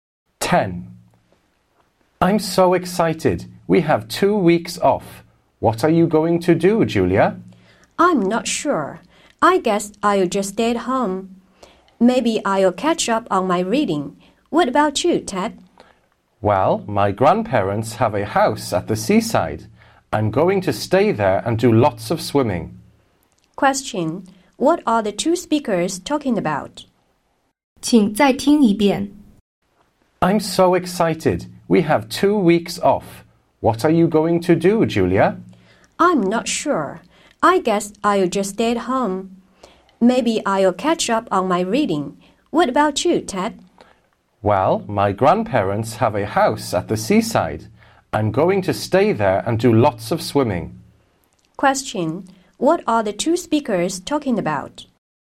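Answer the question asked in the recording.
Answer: Their plans for the two-week holiday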